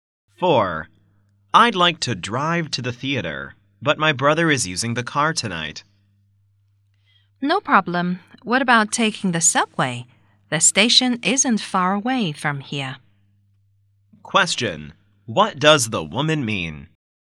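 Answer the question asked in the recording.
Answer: He can take the subway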